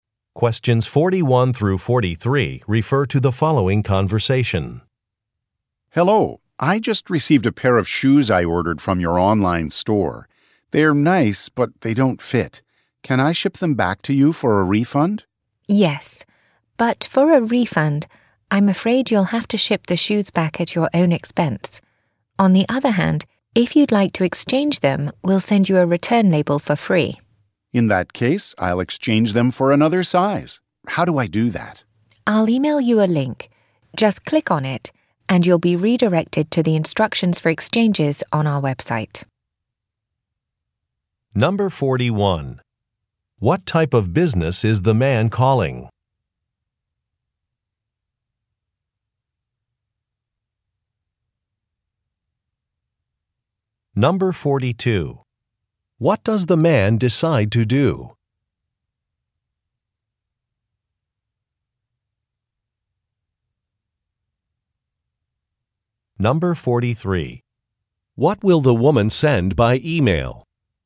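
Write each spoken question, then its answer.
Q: What type of business is the man calling?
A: An online shoe store

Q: What does the man decide to do?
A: Exchange the shoes for another size

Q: What will the woman send by email?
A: A link to the exchange instructions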